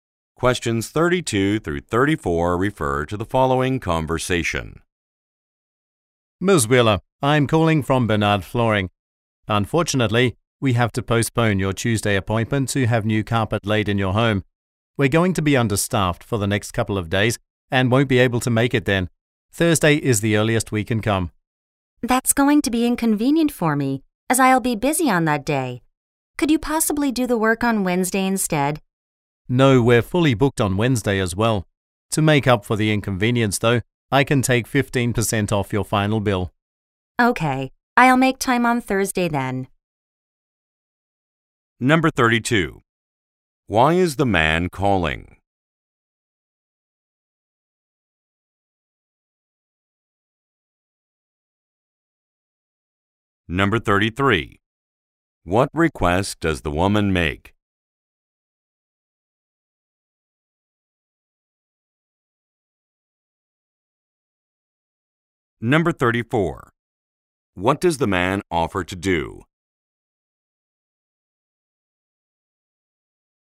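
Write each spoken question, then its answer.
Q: Why is the man calling?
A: To postpone the Tuesday carpet-laying appointment

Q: What request does the woman make?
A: To have the work done on Wednesday instead

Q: What does the man offer to do?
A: Take 15% off her final bill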